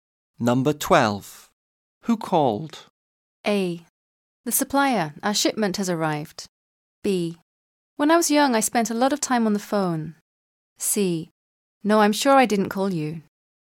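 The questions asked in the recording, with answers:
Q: Who called?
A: A: The supplier. Our shipment has arrived.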